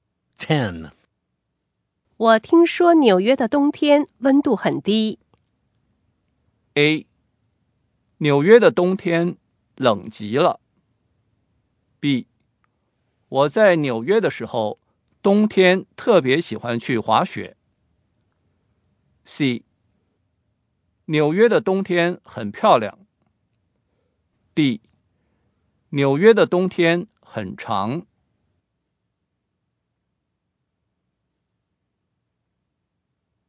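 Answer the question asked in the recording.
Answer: A: 纽约的冬天冷极了。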